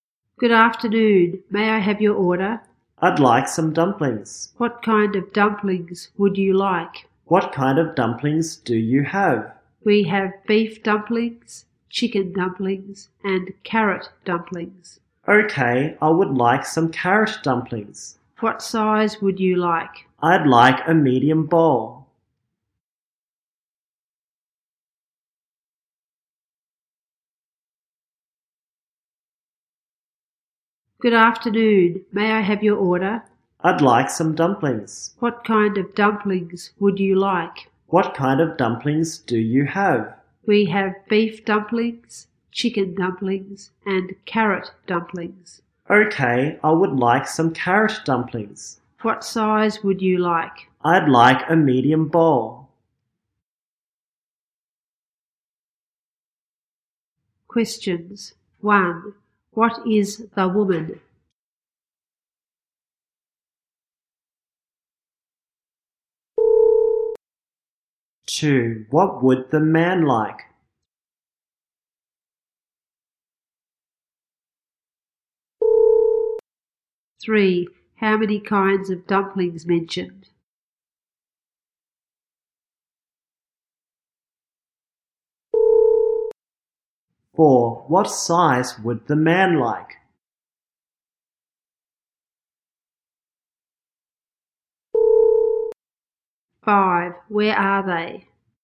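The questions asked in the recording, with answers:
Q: What would the man like?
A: Carrot dumplings

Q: How many kinds of dumplings mentioned?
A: Three

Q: What size would the man like?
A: A medium bowl

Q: Where are they?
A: In a restaurant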